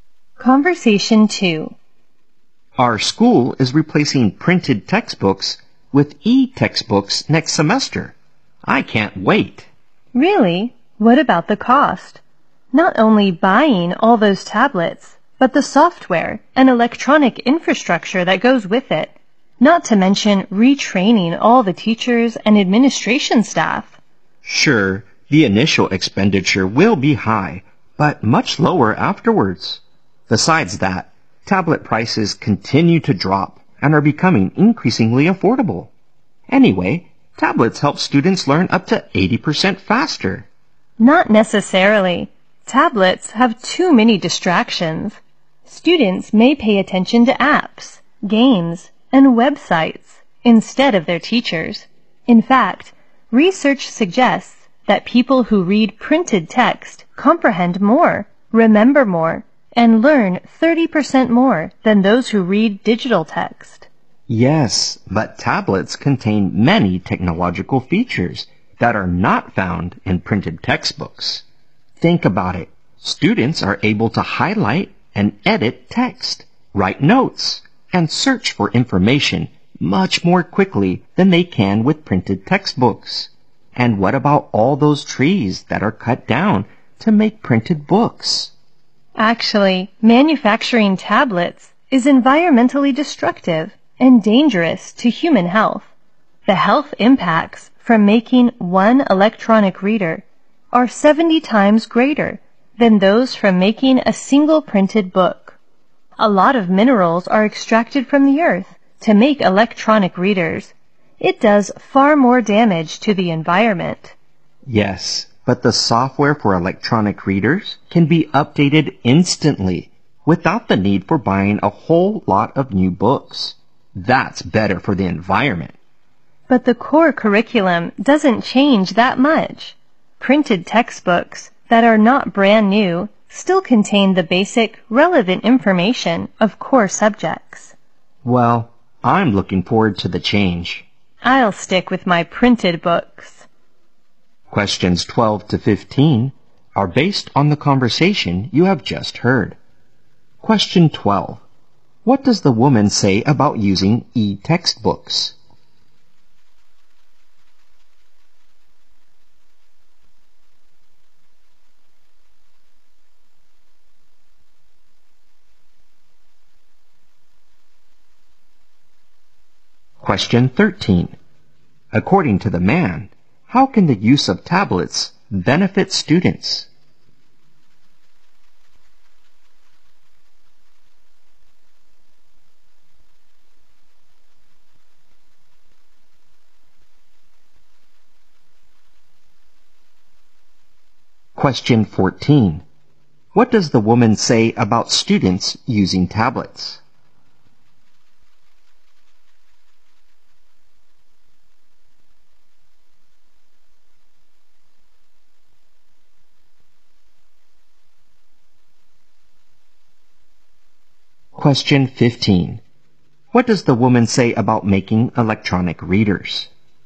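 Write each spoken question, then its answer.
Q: What does the woman say about students using tablets?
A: Students may be distracted by apps, games and websites

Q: What does the woman say about making electronic readers?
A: It is environmentally destructive and harmful to health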